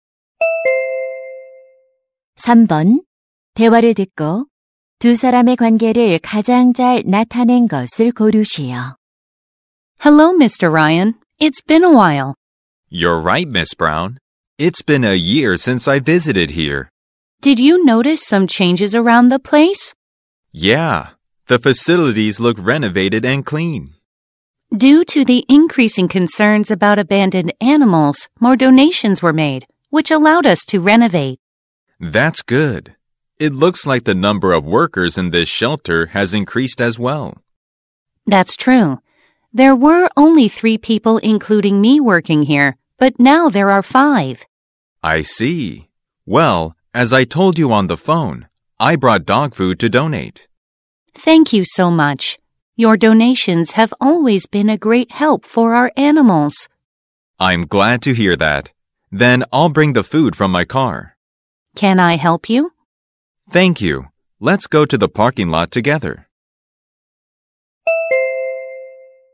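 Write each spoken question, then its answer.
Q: 대화를 듣고 두 사람의 관계를 가장 잘 나타낸 것을 고르시오.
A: 동물 보호소 직원 - 기부자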